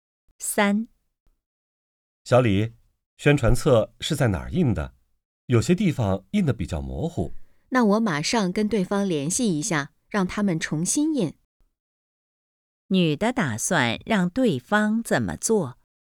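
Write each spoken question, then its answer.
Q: 女的打算让对方怎么做?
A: 重新印宣传册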